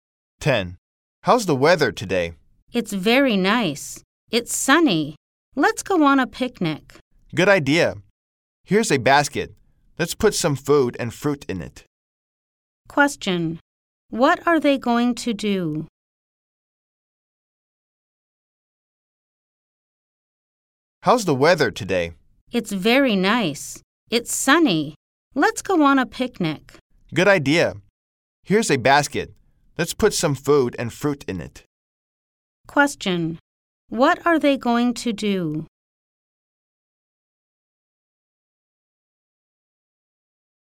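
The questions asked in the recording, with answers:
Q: What are they going to do?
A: Go on a picnic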